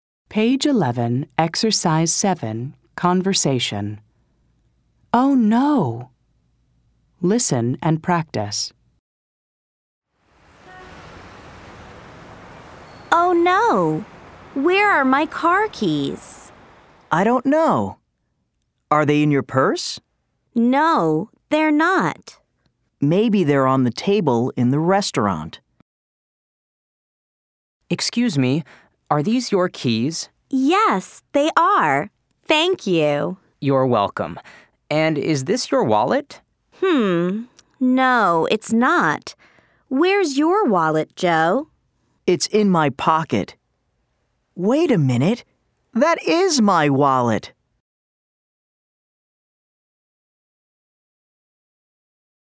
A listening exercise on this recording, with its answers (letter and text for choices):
ضع True أو False:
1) Kate cannot find her car keys.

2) Joe says the keys are in his pocket.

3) The server finds Kate's keys.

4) The server also asks about a wallet.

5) Kate says the wallet is hers.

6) At the end Joe realizes the wallet is his.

7) Multiple Choice | اختر الإجابة الصحيحة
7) Kate is looking for her ______.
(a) earrings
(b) purse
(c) car keys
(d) scarf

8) Joe asks if the keys are in Kate's ______.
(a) box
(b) purse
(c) pocket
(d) wallet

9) Joe says maybe the keys are on the table in the ______.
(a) car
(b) house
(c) classroom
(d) restaurant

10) The server asks, "Are these your ______?"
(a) books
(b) keys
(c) glasses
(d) earrings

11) Joe's wallet is in his ______.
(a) purse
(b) pocket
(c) box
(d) car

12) At the end Joe says:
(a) These are my keys.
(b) That is my wallet!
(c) This is my scarf.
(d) They are my earrings.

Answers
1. True
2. False
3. True
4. True
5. False
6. True
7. (c) car keys
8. (b) purse
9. (d) restaurant
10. (b) keys
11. (b) pocket
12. (b) That is my wallet!